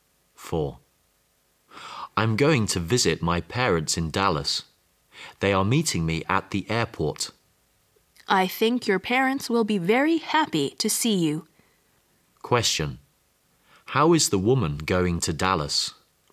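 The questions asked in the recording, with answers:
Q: How is the woman going to Dallas?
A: By plane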